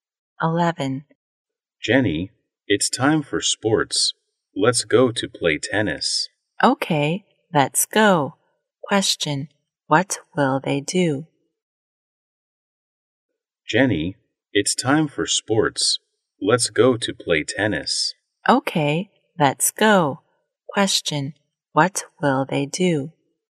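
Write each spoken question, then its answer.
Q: what will they do?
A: Play tennis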